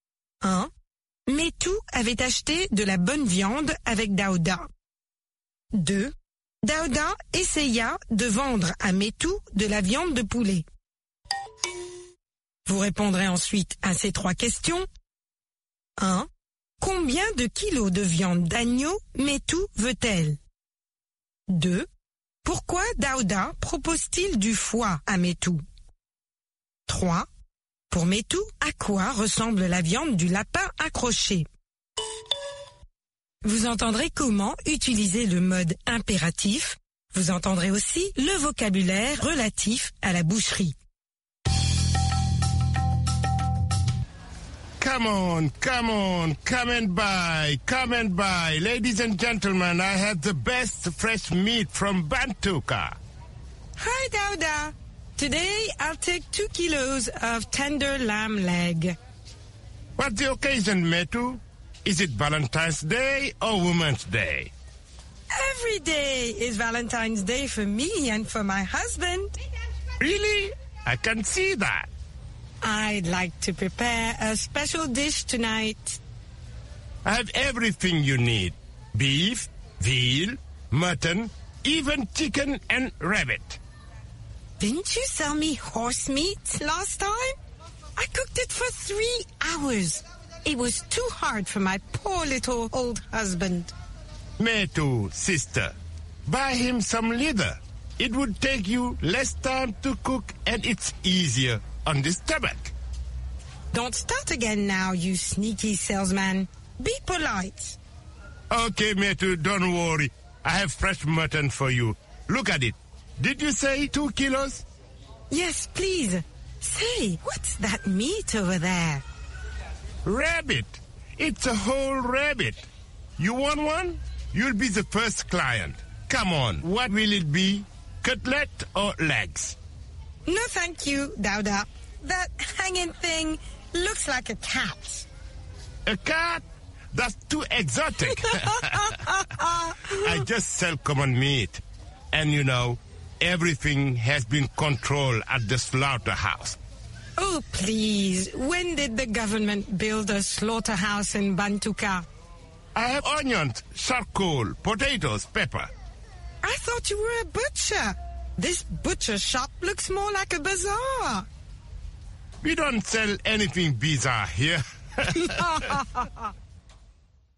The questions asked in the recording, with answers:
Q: Metu avait acheté de la bonne viande avec Daouda.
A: L'énoncé 1 est faux.

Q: Daouda essaya de vendre à Metu de la viande de poulet.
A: L'énoncé 2 est faux.

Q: Combien de kilos de viande d'agneau Metu veut-elle?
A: 2 kilos.

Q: Pourquoi Daouda propose-t-il du foie à Metu?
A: Ça prend moins de temps à cuire.

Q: Pour Metu, à quoi ressemble la viande du lapin accroché?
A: À un chat.